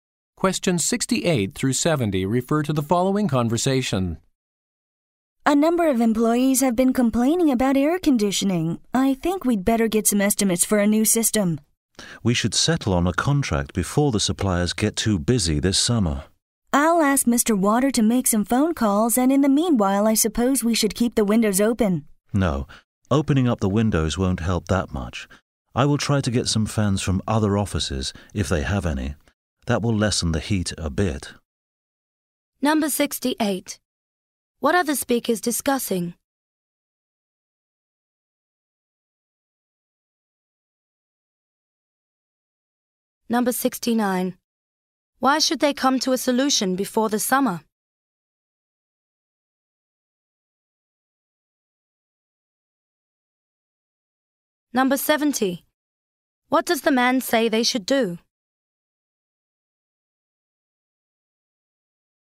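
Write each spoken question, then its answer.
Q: What are the speakers discussing?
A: Replacing the air conditioning system

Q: Why should they come to a solution before the summer?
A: The suppliers will get too busy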